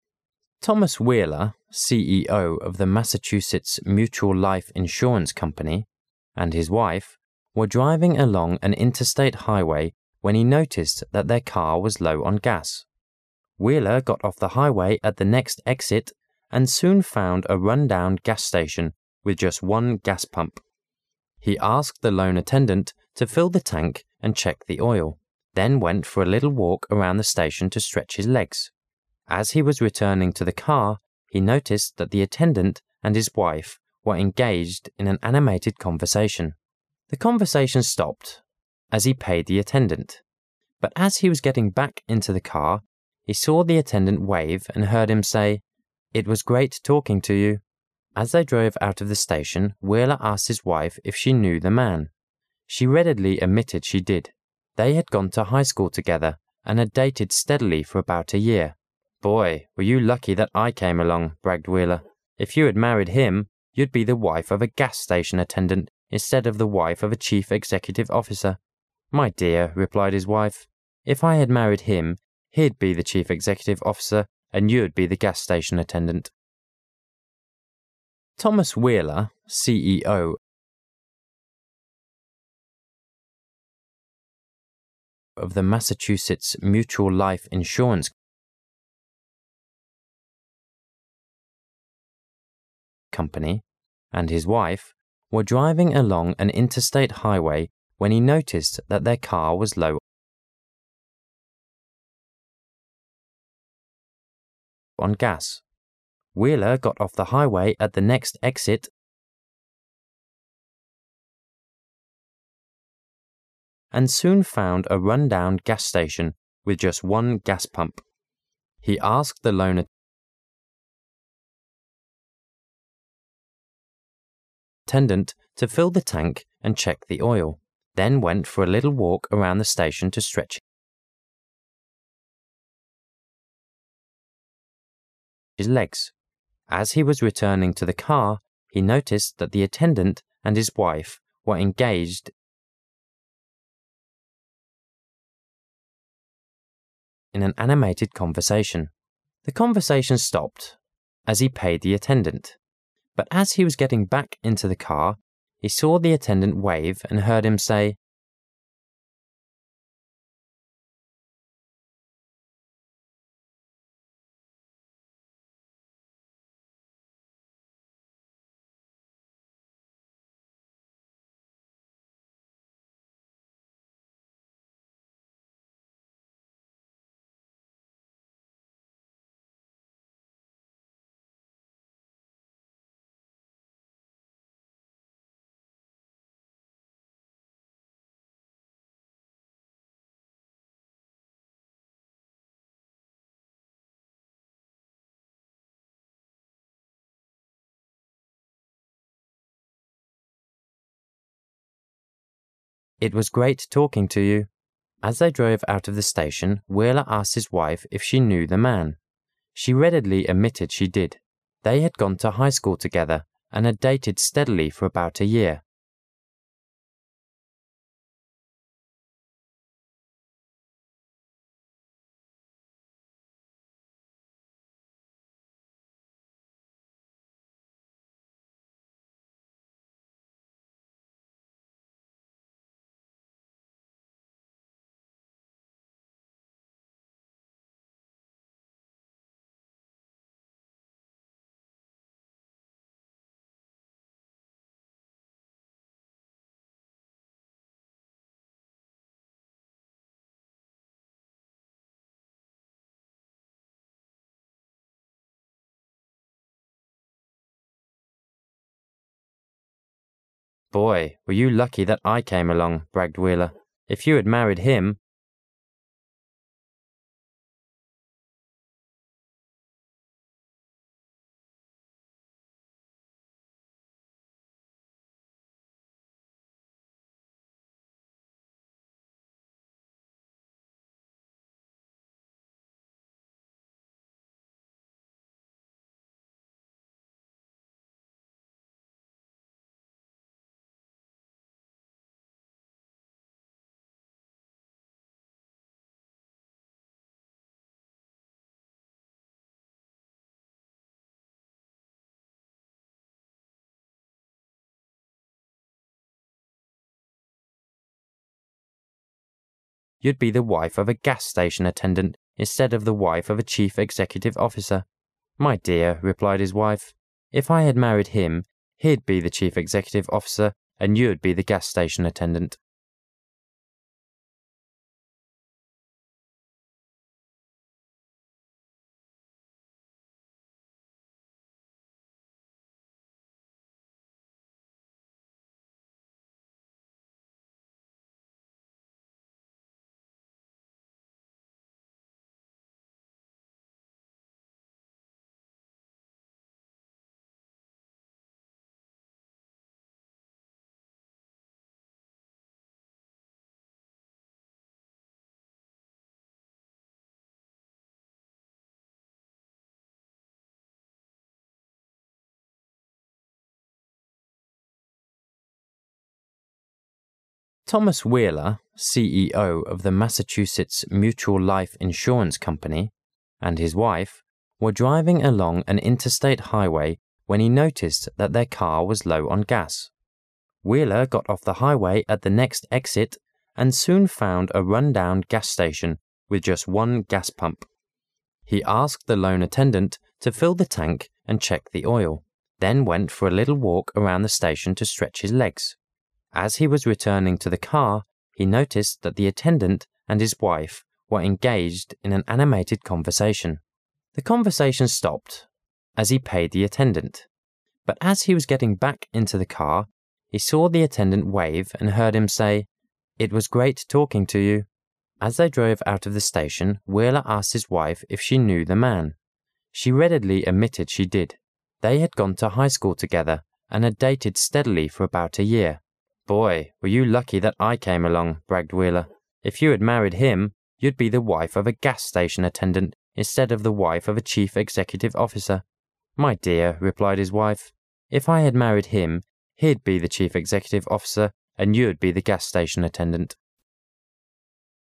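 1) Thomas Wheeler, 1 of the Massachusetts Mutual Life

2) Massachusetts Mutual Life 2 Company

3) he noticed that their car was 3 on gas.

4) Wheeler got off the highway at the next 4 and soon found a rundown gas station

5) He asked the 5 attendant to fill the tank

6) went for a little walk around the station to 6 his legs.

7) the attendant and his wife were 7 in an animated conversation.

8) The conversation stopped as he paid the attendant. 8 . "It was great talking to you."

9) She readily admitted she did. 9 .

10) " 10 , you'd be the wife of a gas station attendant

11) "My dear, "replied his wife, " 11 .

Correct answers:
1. CEO
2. Insurance
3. low
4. exit
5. lone
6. stretch
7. engaged
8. but as he was getting back into the car, he saw the attendant wave and heard him say
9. They had gone to high school together and had dated steadily for about a year
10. If you had married him
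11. if I had married him, he'd be the chief executive officer and you'd be the gas station attendant

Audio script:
Thomas Wheeler, 1 of the Massachusetts Mutual Life 2 Company, and his wife were driving along an interstate highway when he noticed that their car was 3 on gas. Wheeler got off the highway at the next 4 and soon found a rundown gas station with just one gas pump. He asked the 5 attendant to fill the tank and check the oil, then went for a little walk around the station to 6 his legs. As he was returning to the car, he noticed that the attendant and his wife were 7 in an animated conversation.
As he was returning to the car, he noticed that the attendant and his wife were engaged in an animated conversation. The conversation stopped as he paid the attendant. But as he was getting back into the car, he saw the attendant wave and heard him say, "It was great talking to you." As they drove out of the station, Wheeler asked his wife if she knew the man. 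She readily admitted she did. They had gone to high school together and had dated steadily for about a year. "Boy, were you lucky that I came along," bragged Wheeler. "If you had married him, you'd be the wife of a gas station attendant instead of the wife of a chief executive officer." "My dear, "replied his wife, "if I had married him, he'd be the chief executive officer and you'd be the gas station attendant."
Insurance
low
exit
lone
stretch
engaged
if I had married him, he'd be the chief executive officer and you'd be the gas station attendant.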